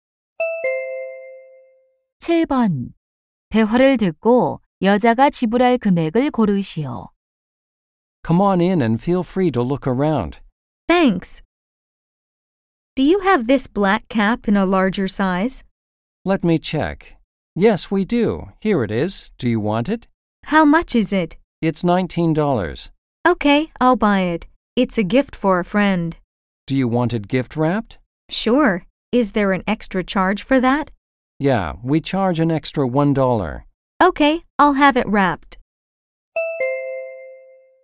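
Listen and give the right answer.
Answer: $20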